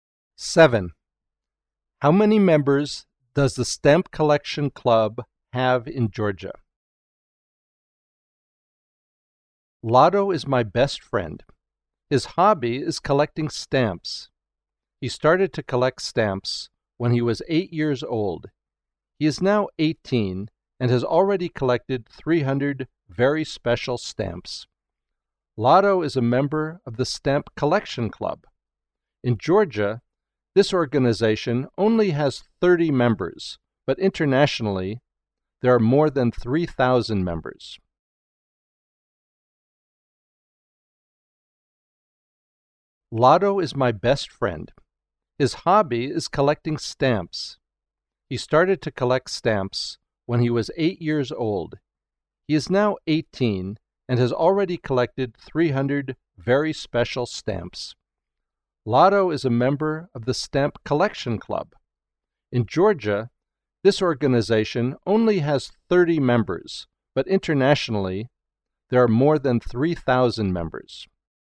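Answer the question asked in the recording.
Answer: 30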